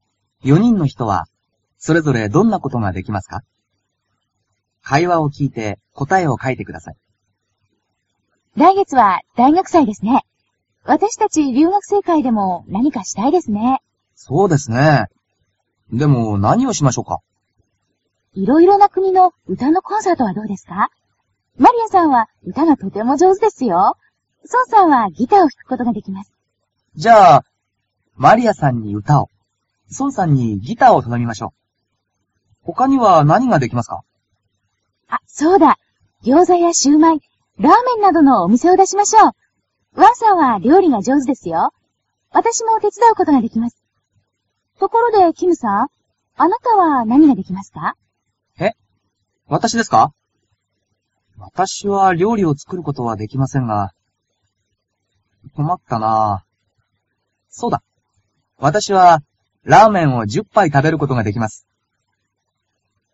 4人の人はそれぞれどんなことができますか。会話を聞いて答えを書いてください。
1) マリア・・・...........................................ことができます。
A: (じょうずに)うたをうたう

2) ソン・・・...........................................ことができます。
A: ギターをひく

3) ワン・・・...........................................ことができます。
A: (じょうずに)りょうりをつくる

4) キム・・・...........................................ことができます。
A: ラーメンを10ぱいたべる

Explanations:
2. ソンさんはギターをひくことができます。
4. わたしはラーメンを10杯食べることができます。

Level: cơ bản